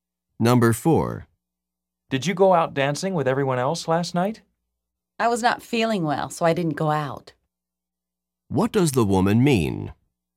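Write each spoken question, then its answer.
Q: What does the woman mean?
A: She didn't go out because she felt sick.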